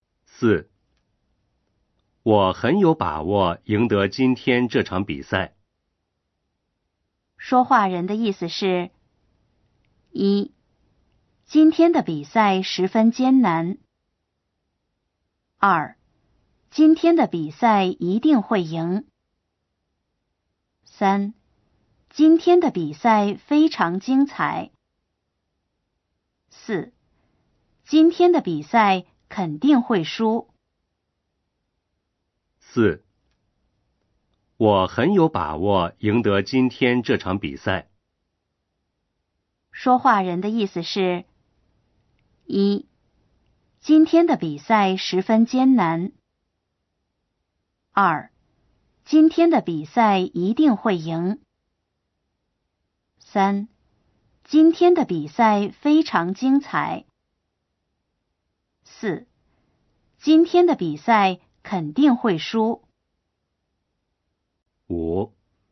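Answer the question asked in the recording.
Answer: 二: 今天的比赛一定会赢。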